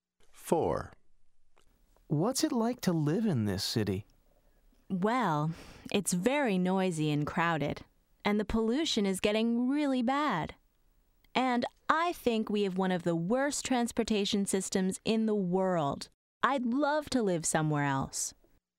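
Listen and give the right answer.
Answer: No, doesn't like it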